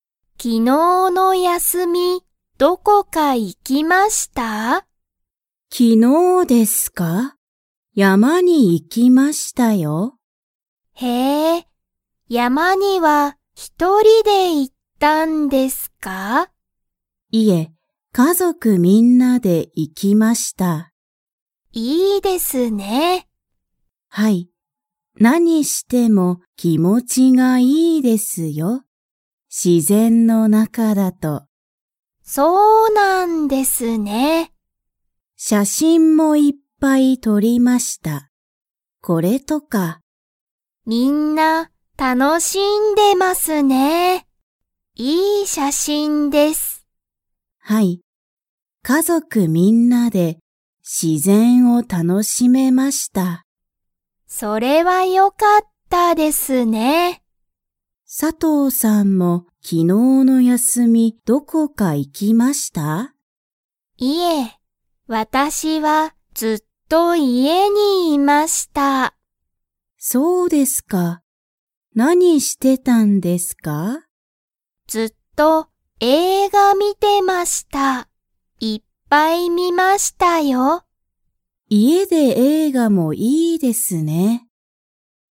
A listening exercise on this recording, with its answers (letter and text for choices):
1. 田中(たなか)さんは、一人(ひとり)で山(やま)に行(い)きましたか?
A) はい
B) いいえ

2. 佐藤(さとう)さんは、昨日(きのう)はずっと____にいた。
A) 山(やま)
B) 家(いえ)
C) 自然(しぜん)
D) 映画(えいが)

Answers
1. B) いいえ
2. B) 家(いえ)

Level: Level 2